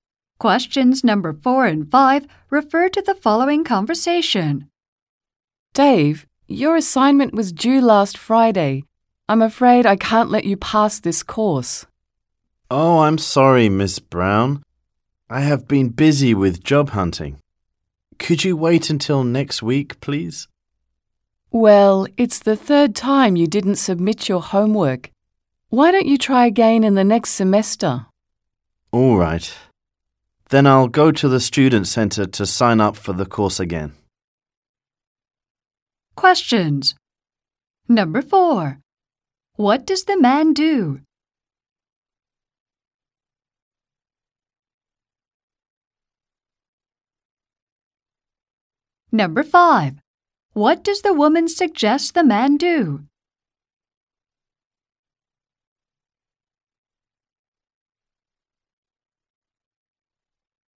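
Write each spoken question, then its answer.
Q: What does the man do?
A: He is a student.

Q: What does the woman suggest the man do?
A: Take the course again next semester.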